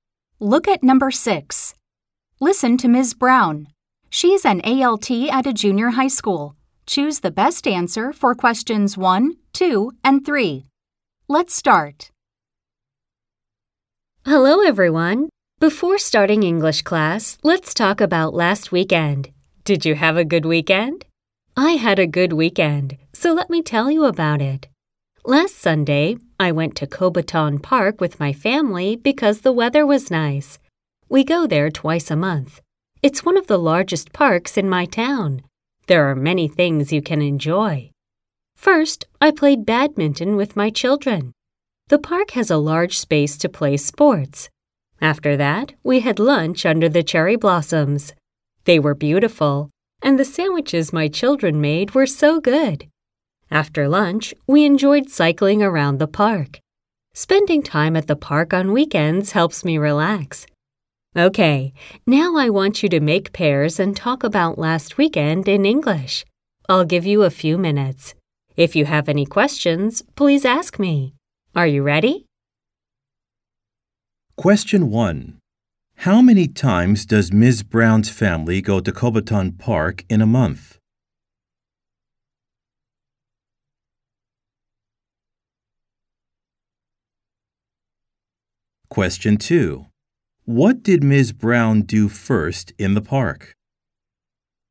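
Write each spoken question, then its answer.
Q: How many times does Ms. Brown's family go to Cobaton Park in a month?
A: Twice a month

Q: What did Ms. Brown do first in the park?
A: She played badminton with her children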